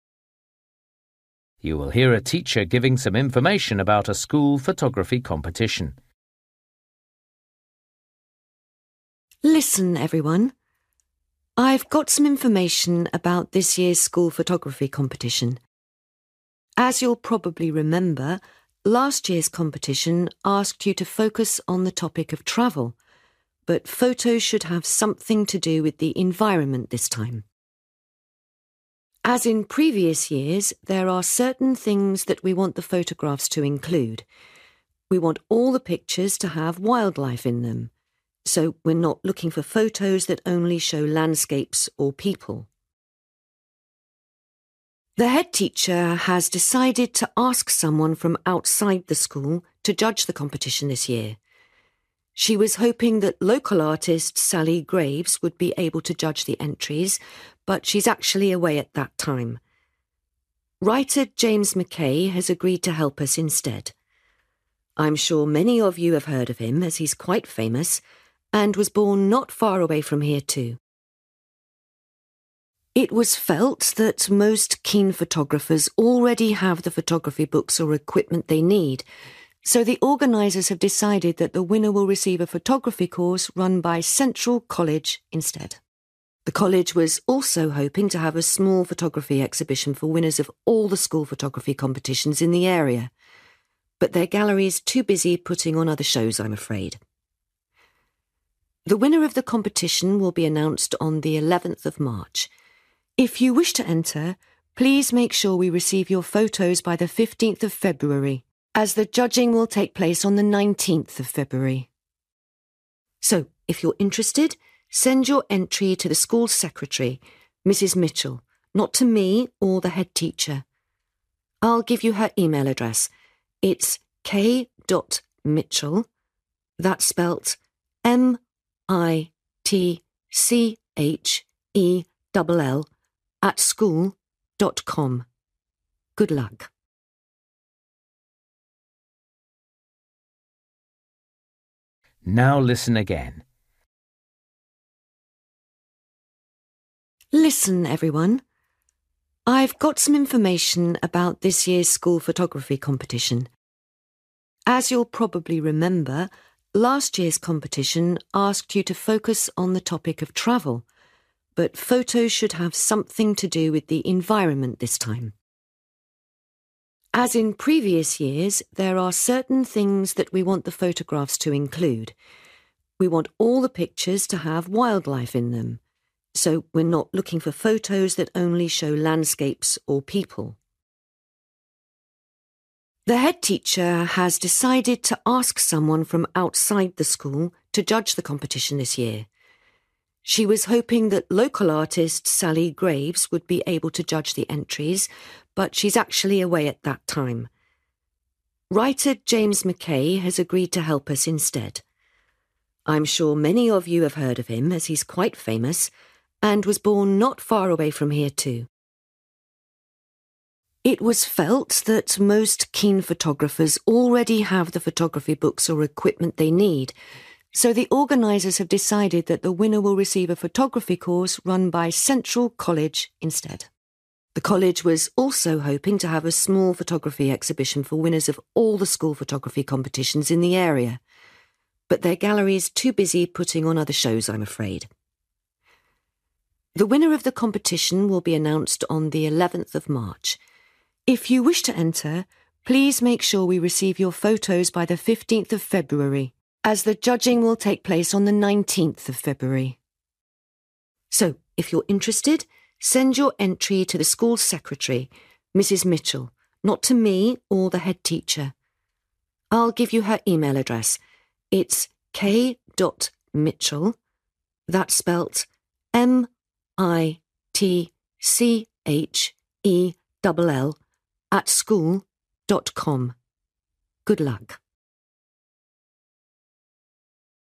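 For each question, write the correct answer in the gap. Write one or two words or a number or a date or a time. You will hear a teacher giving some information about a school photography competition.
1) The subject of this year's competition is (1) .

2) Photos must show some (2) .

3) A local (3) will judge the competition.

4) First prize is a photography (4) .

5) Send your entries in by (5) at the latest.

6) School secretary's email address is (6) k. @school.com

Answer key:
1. the environment
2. wildlife
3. writer
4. course
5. 15th February
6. mitchell

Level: Luyện nghe trình độ B1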